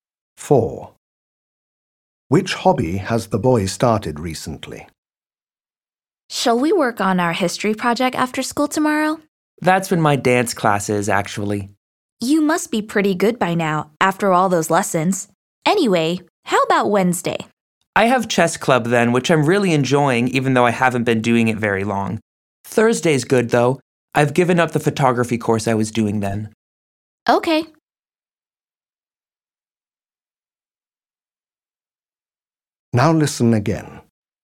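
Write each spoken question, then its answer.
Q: Which hobby has the boy started recently?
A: Chess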